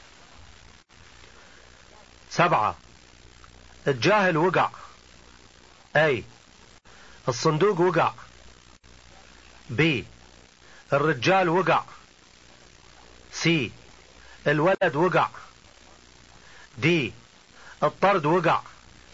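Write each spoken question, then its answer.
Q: سبعة الجاهل وقع.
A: C: الولد وقع.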